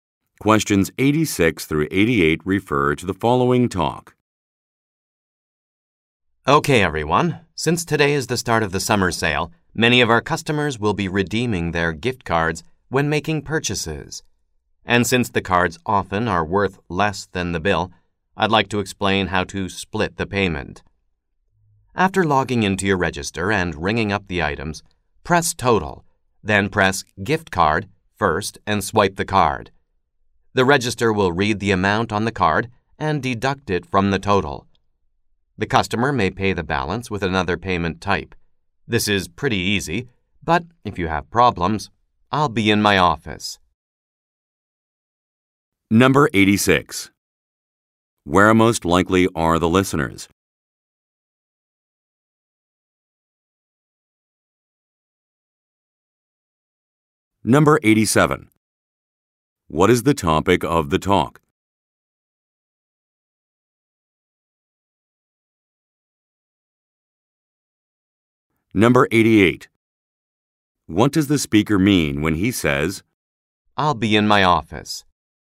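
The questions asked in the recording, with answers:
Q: Where most likely are the listeners?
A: In a retail store

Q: What is the topic of the talk?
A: How to split a payment using gift cards

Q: What does the speaker mean when he says,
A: He is available to help if there are problems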